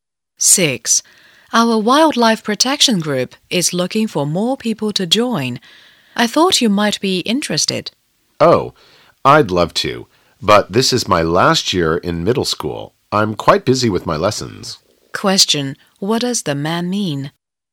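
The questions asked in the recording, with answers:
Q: What does the man mean?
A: He is too busy with his lessons to join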